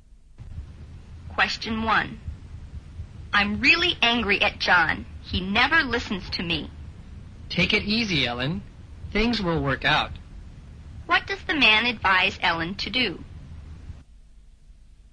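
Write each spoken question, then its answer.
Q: What does the man advise Ellen to do?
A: Take it easy (calm down)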